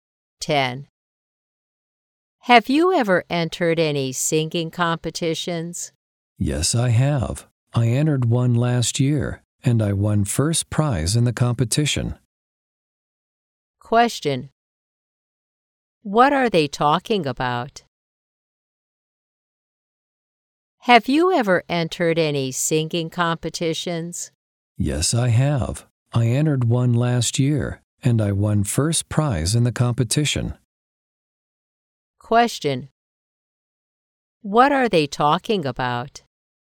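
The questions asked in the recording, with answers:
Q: What are they talking about?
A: A singing competition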